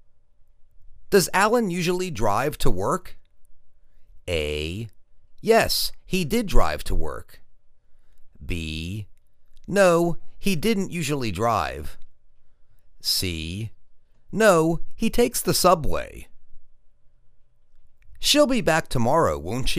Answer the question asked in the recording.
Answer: No, he takes the subway.